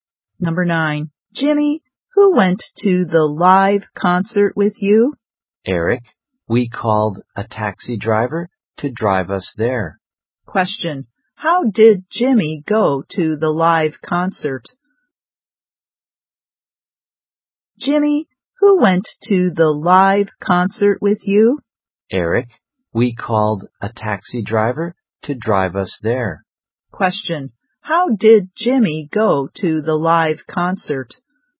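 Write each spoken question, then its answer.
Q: How did Jimmy go to the live concert?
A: By taxi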